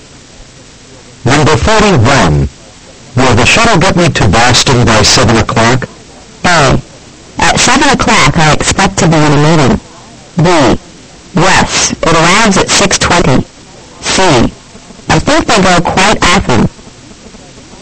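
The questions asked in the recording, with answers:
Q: Will the shuttle get me to Boston by 7 o'clock?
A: B: Yes, it arrives at 6:20.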